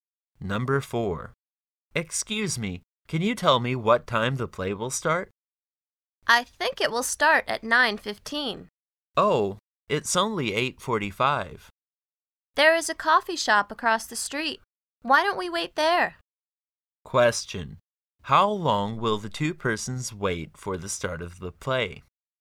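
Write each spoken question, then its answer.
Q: How long will the two persons wait for the start of the play?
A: 30 minutes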